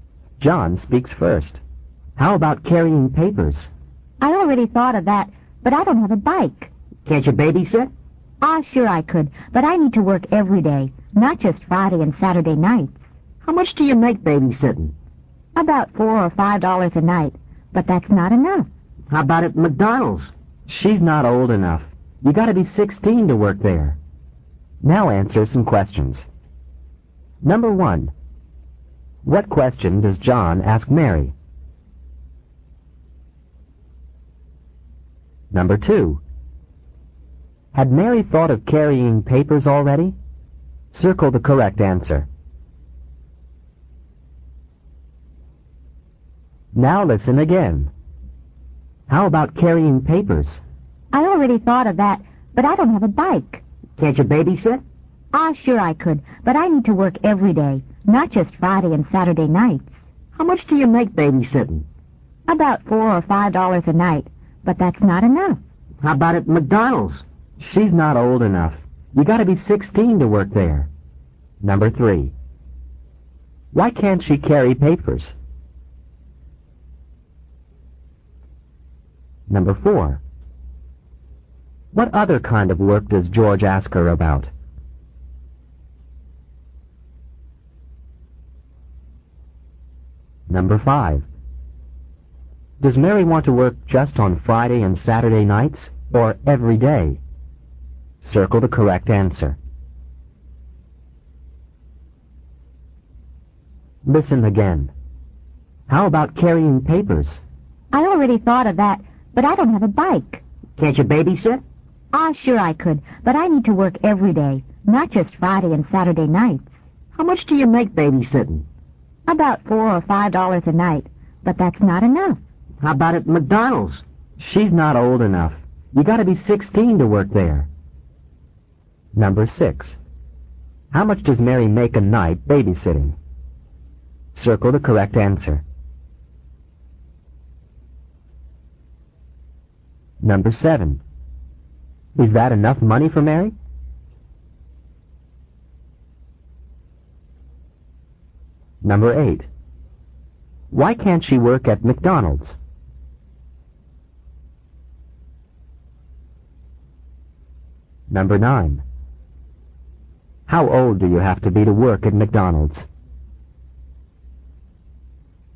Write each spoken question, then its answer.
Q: What question does John ask Mary?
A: How, capital H-O-W, about, A-B-O-U-T, carrying papers, P-A-P-E-R-S.

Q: Had Mary thought of carrying papers already?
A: Yes, she already had.

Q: Why can't she carry papers?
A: She doesn't have a bike.

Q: What other kind of work does George ask her about?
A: He asks her if she can babysit.

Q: Does Mary want to work just on Friday and Saturday nights, or every day?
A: The correct answer is B, every day.

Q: How much does Mary make a night babysitting?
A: The correct answer is C, about $4 or $5.

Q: Is that enough money for Mary?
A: No, it isn't enough.

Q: Why can't she work at McDonald's?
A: because she's not old enough.

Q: How old do you have to be to work at McDonald's?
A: you have to be 16.